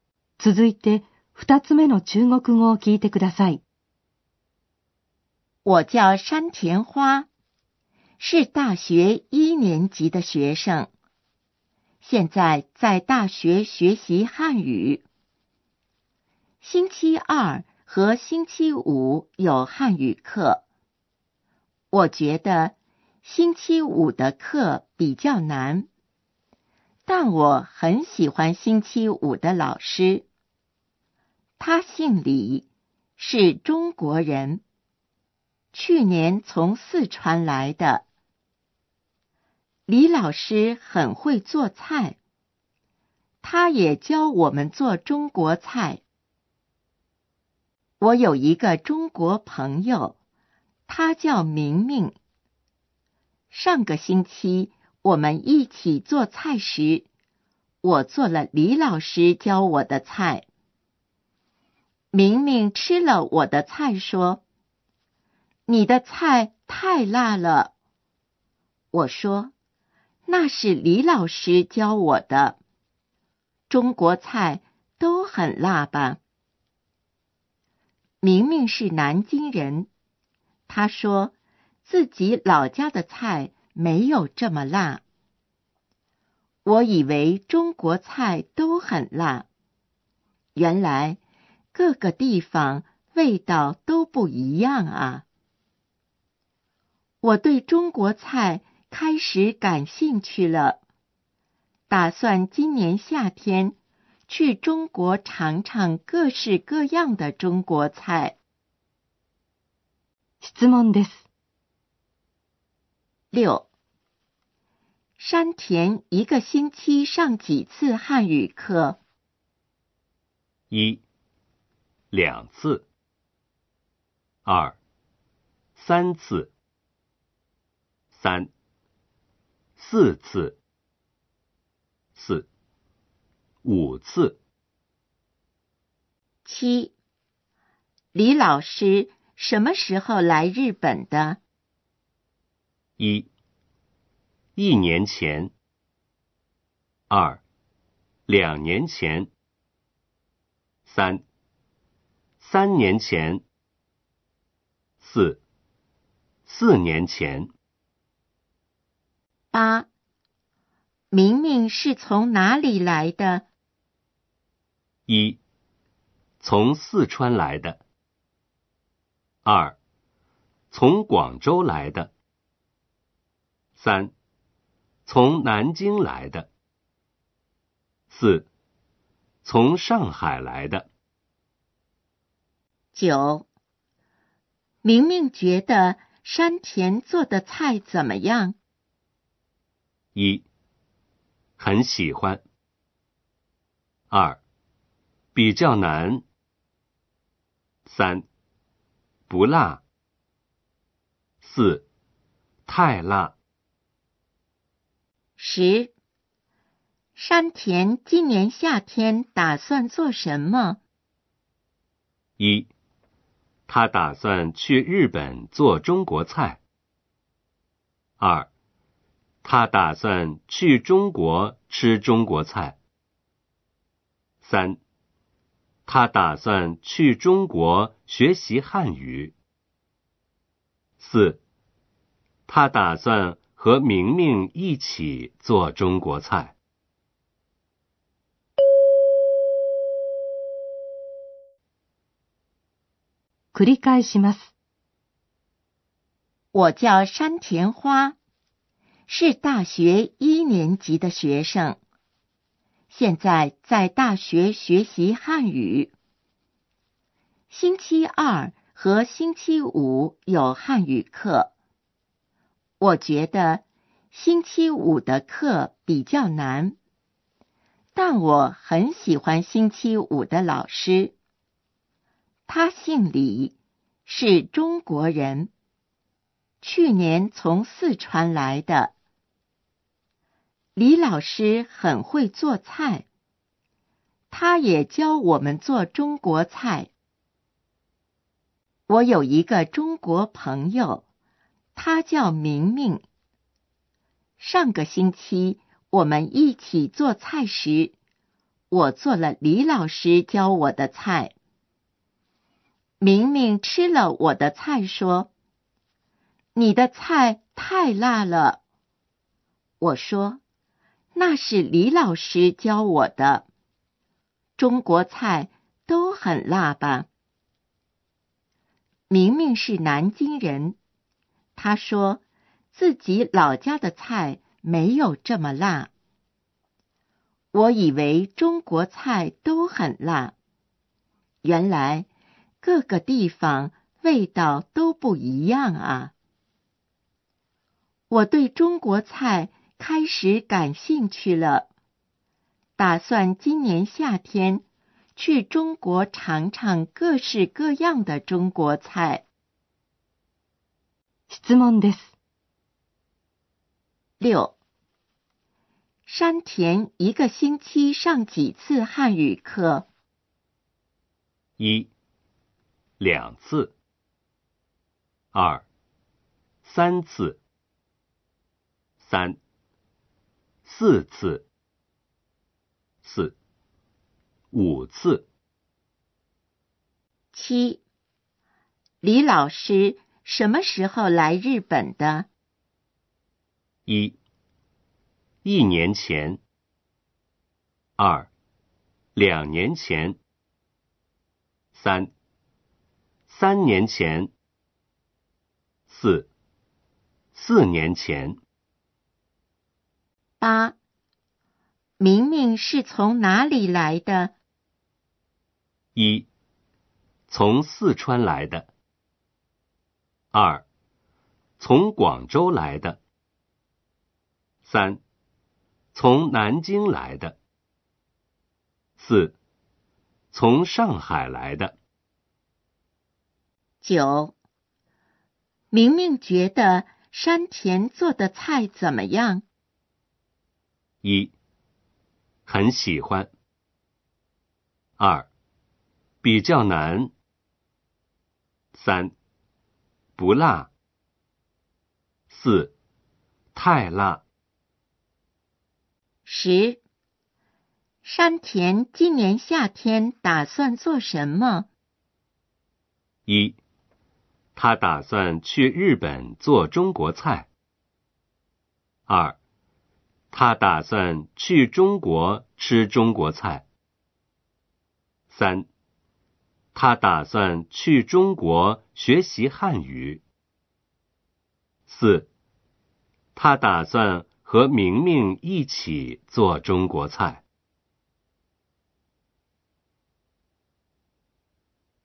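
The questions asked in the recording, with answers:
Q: 山田一个星期上几次汉语课?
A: 1: 两次。

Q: 李老师什么时候来日本的?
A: 1: 一年前。

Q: 明明是从哪里来的?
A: 3: 从南京来的。

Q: 明明觉得山田做的菜怎么样?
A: 4: 太辣。

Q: 山田今年夏天打算做什么?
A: 2: 他打算去中国吃中国菜。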